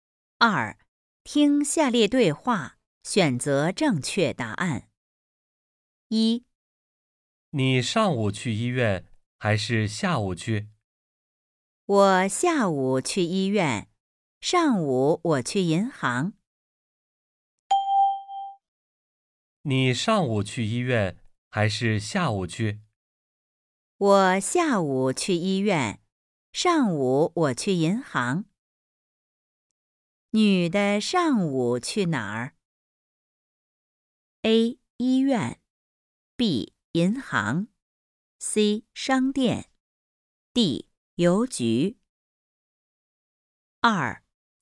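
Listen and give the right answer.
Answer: B: 银行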